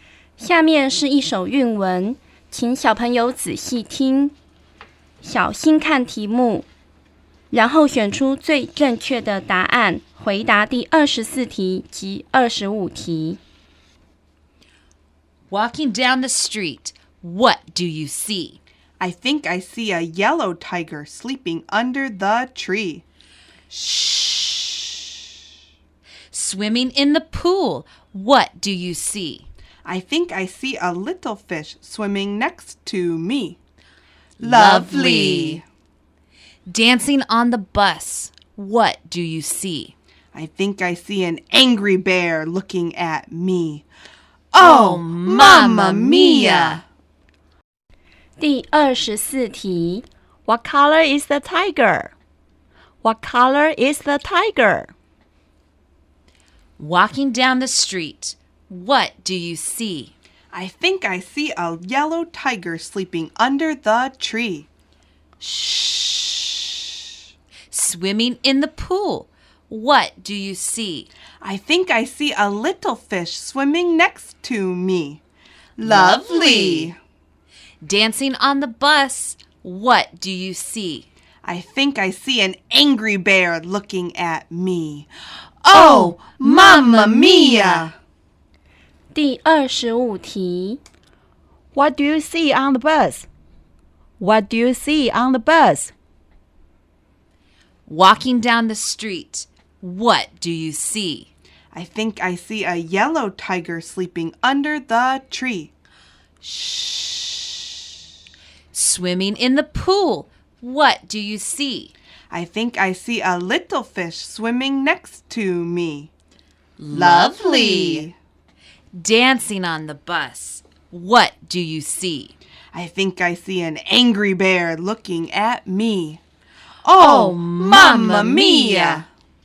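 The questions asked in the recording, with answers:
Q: What color is the tiger?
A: Yellow

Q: What do you see on the bus?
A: An angry bear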